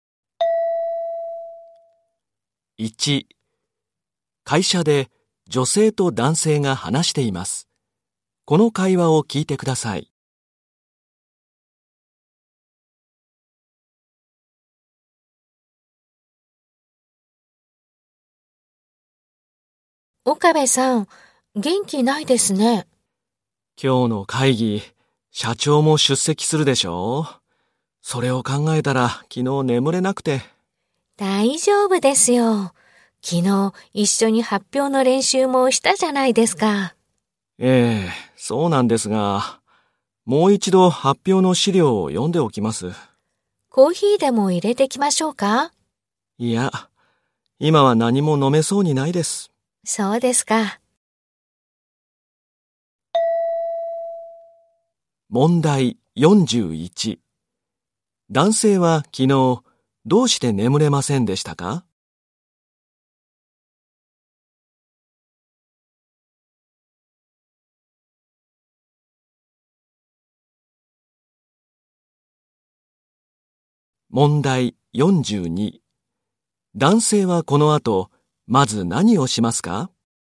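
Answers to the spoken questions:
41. 社長も出席する今日の会議のことを考えたから
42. 発表の資料をもう一度読む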